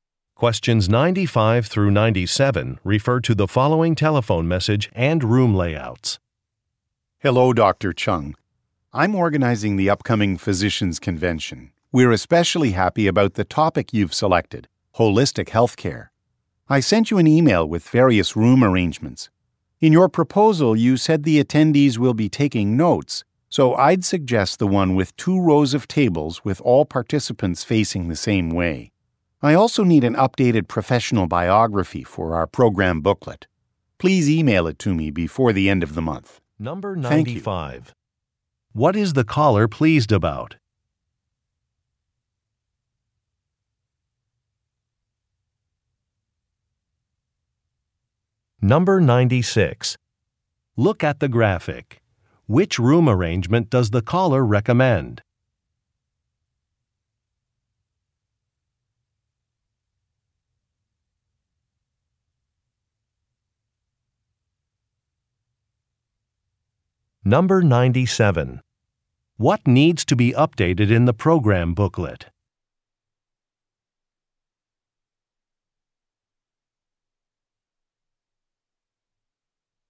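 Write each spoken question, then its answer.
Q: What is the caller pleased about?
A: The topic Dr. Chung selected, holistic healthcare

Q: What needs to be updated in the program booklet?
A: Dr. Chung's professional biography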